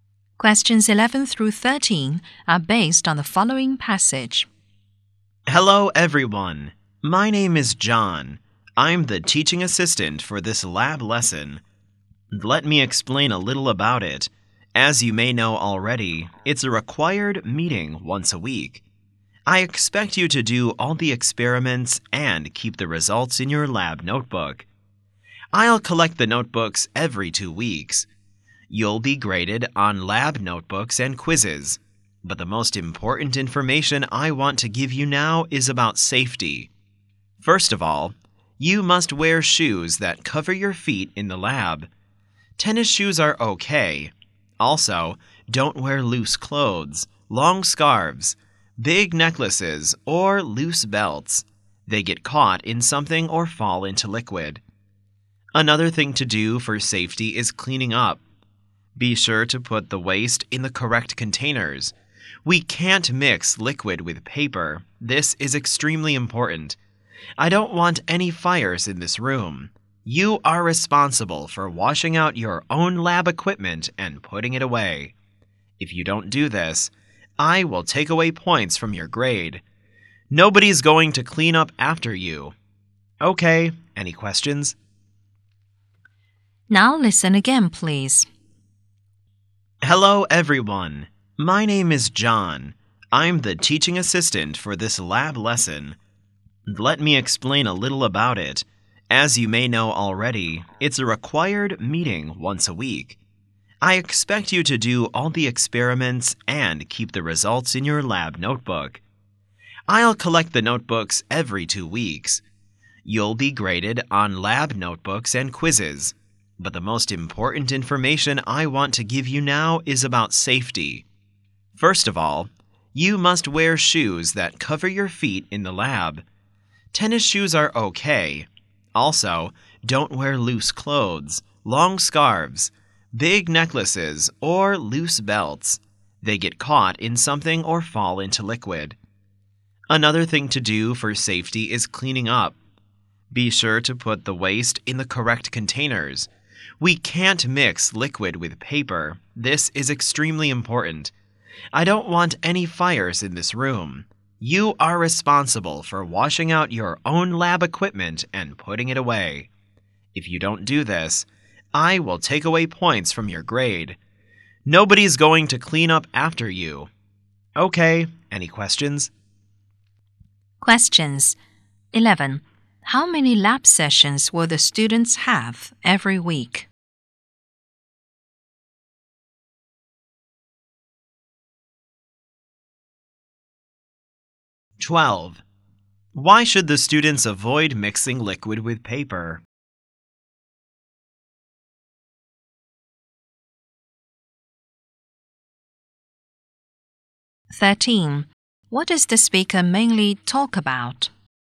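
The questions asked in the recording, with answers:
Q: How many lab sessions will the students have every week?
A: One.

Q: Why should the students avoid mixing liquid with paper?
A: To avoid fires.

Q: What does the speaker mainly talk about?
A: Lab requirements and safety rules.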